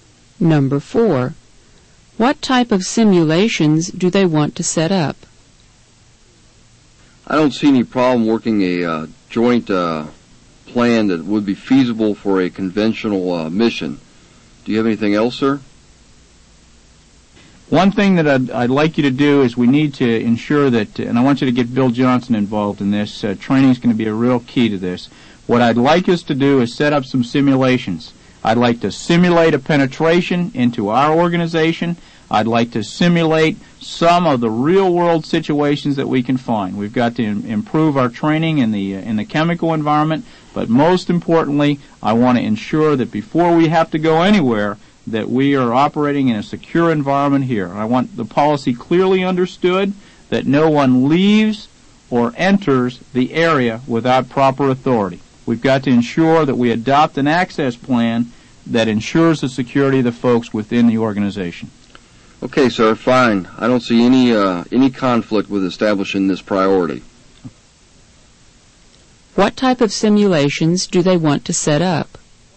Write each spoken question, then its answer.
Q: What type of simulations do they want to set up?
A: The answer is C.